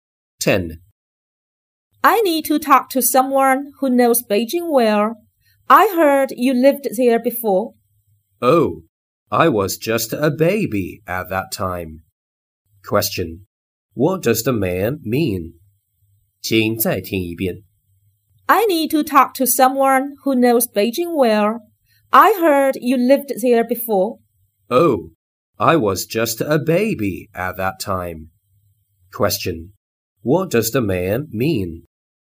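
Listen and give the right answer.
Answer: He doesn't know Beijing well because he was only a baby when he lived there.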